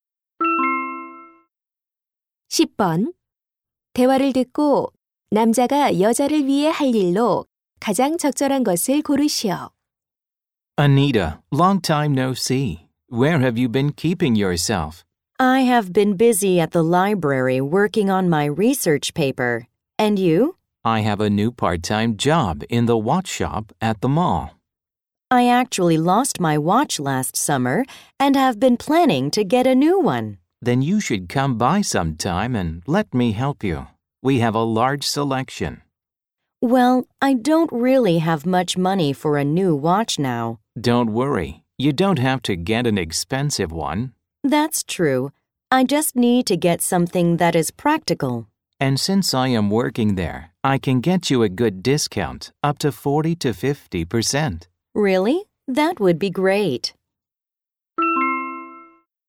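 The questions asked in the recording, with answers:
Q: 대화를 듣고 남자가 여자를 위해 할 일로 가장 적절한 것을 고르시오.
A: 시계 구매 시 할인해 주기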